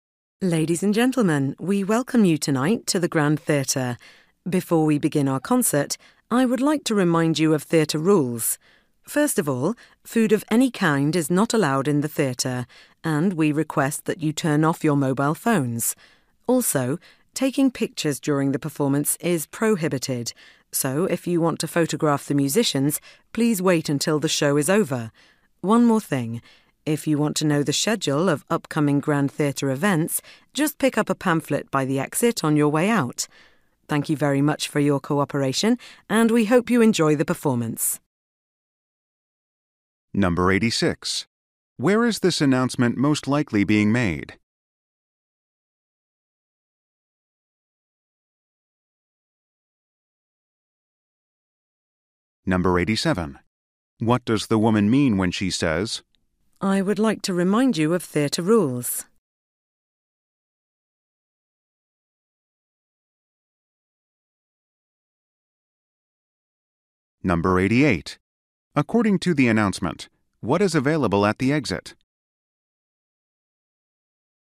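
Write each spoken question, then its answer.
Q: Where is this announcement most likely being made?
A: In a theatre, before a concert

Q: According to the announcement, what is available at the exit?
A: A pamphlet with the schedule of upcoming events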